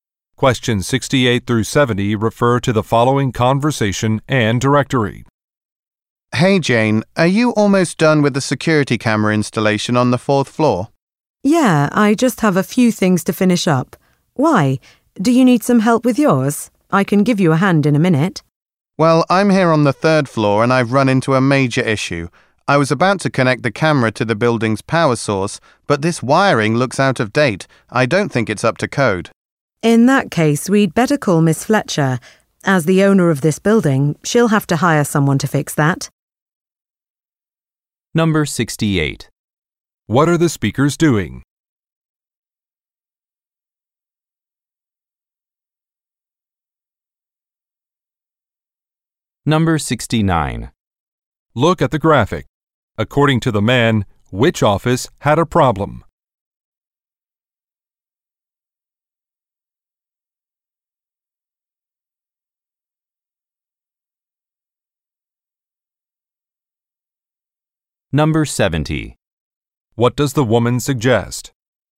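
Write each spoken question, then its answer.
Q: What are the speakers doing?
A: Installing security cameras

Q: What does the woman suggest?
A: Calling the building owner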